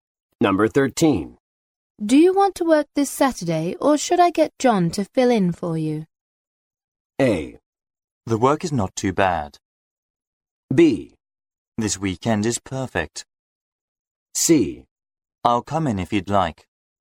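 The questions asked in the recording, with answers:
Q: Do you want to work this Saturday, or should I get John to fill in for you?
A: C: I'll come in if you'd like.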